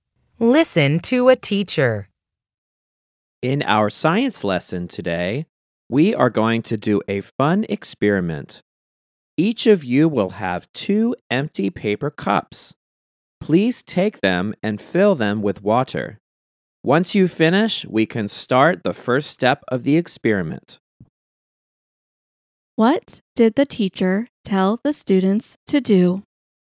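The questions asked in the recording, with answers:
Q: What did the teacher tell the students to do?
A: Fill two paper cups with water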